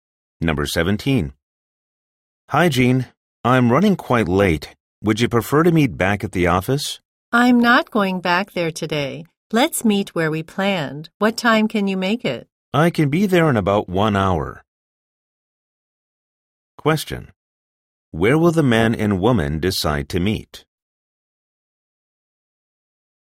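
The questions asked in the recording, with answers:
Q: Where will the man and woman decide to meet?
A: At the place they originally planned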